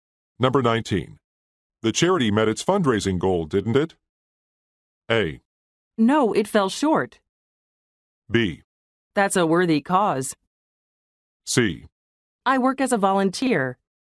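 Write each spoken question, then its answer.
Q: The charity met its fundraising goal, didn't it?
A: A: No, it fell short.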